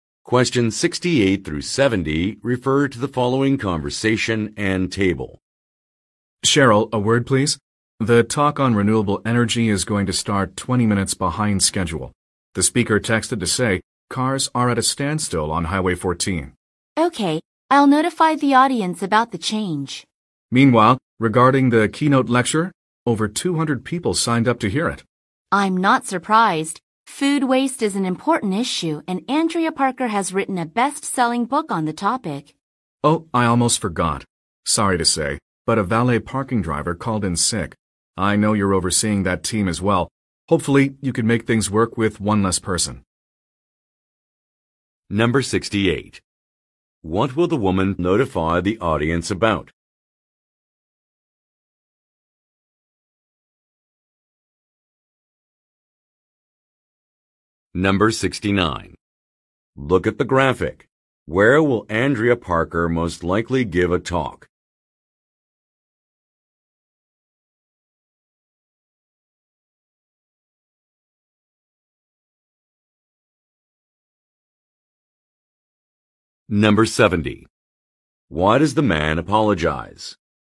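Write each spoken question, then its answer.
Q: What will the woman notify the audience about?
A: The renewable energy talk will start 20 minutes late

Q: Why does the man apologize?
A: A valet parking driver called in sick, so the team is one person short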